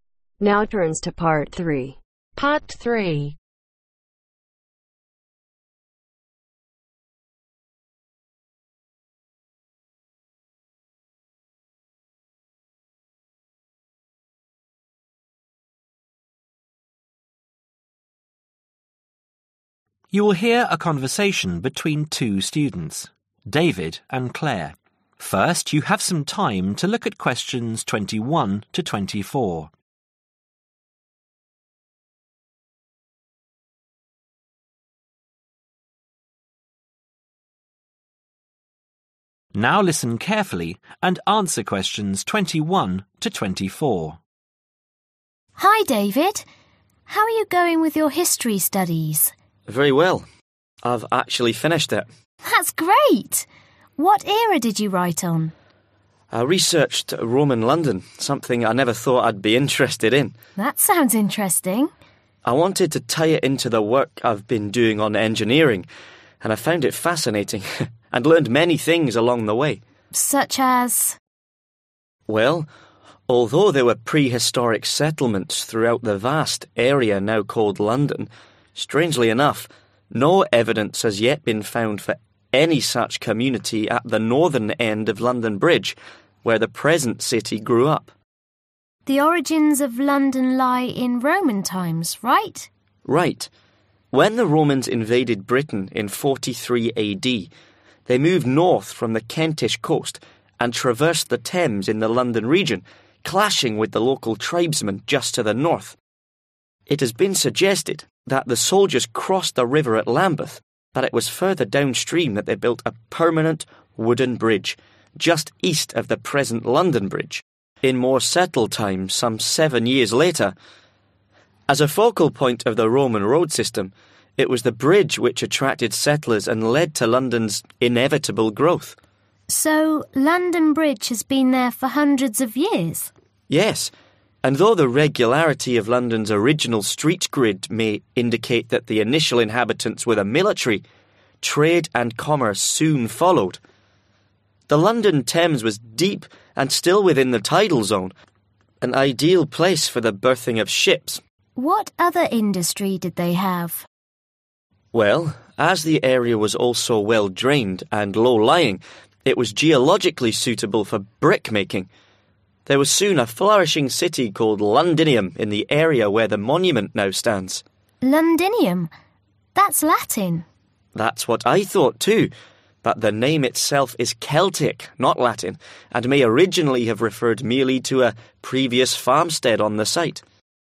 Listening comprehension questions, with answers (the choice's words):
Choose the correct letter A , B or C.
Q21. David chose a topic that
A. has always fascinated him.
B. has a connections with his present studies.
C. was already familiar to him.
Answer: has a connections with his present studies.

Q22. What surprised David was that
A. there were prehistoric settlements in the area.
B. there is no proof of any settlements existing where the city of London is now.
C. London was not that extensive in area.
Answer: there is no proof of any settlements existing where the city of London is now.

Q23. Settlers were attracted to London by its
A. river.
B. road system.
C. bridge.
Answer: bridge.

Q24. London became a thriving commercial city because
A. the military were already stationed there.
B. its initial inhabitants were traders.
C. it was convenient for ships to reach.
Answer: it was convenient for ships to reach.